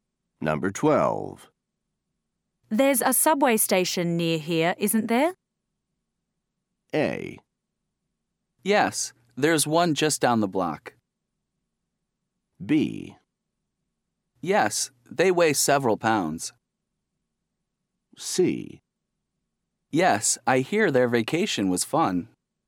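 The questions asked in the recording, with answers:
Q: There's a subway station near here, isn't there?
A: A: Yes, there's one just down the block.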